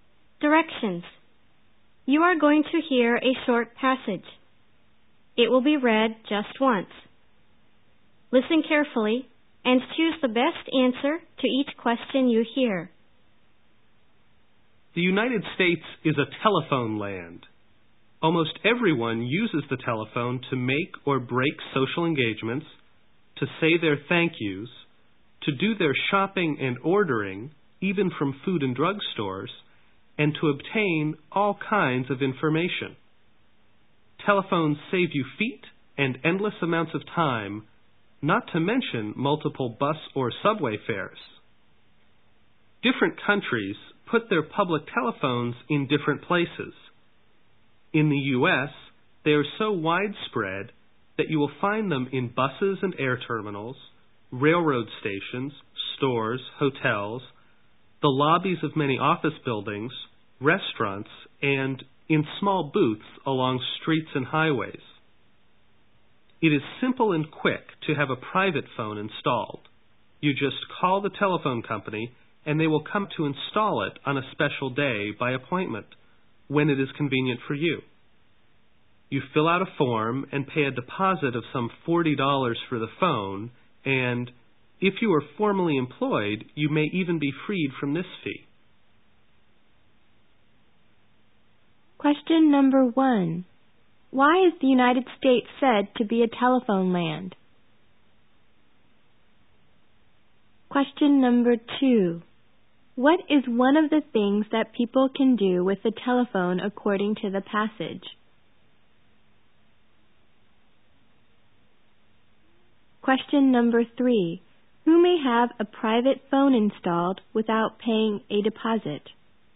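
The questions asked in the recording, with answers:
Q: Why is the United States said to be a telephone land?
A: Almost everyone there uses the telephone for nearly everything.

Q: What is one of the things that people can do with the telephone according to the passage?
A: Do their shopping and ordering (or make social engagements, say thank yous, get information).

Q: Who may have a private phone installed without paying a deposit?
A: People who are formally employed.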